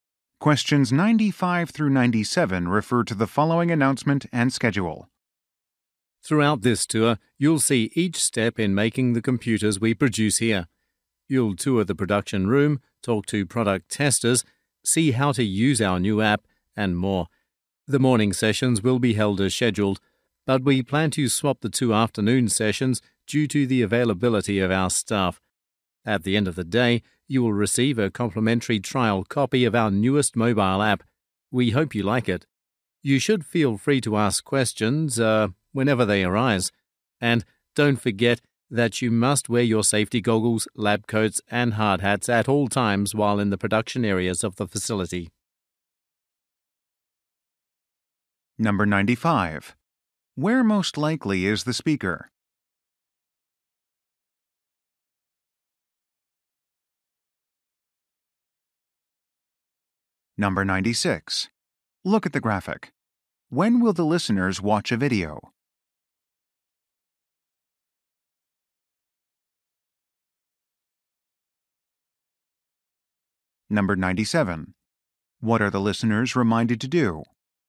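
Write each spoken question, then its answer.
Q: Where most likely is the speaker?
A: At a computer factory

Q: What are the listeners reminded to do?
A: Wear safety gear in production areas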